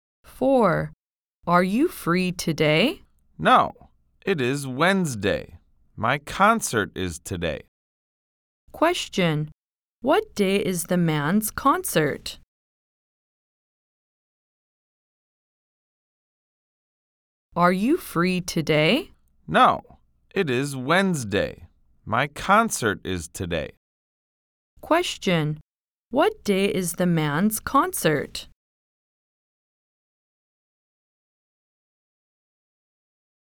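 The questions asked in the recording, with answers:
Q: What day is the man's concert?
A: Wednesday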